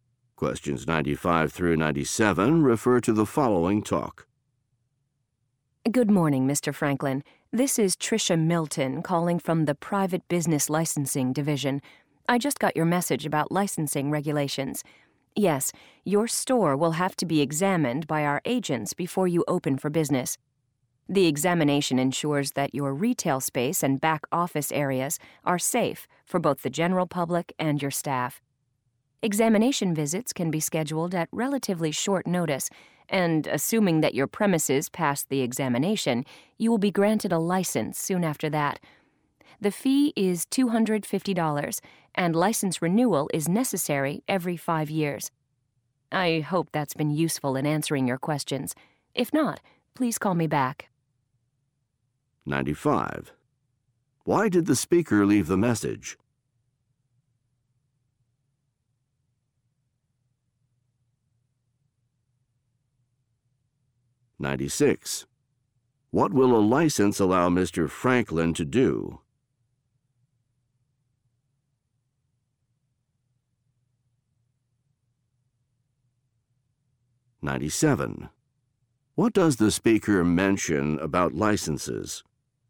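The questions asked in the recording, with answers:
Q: Why did the speaker leave the message?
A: To answer questions about licensing regulations

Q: What will a license allow Mr.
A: Open his store for business

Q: What does the speaker mention about licenses?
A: They must be renewed every 5 years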